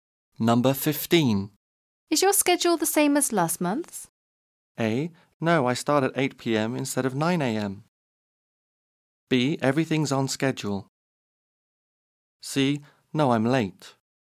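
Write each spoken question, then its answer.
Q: Is your schedule the same as last month's?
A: A: No, I start at 8 p.m. instead of 9 a.m.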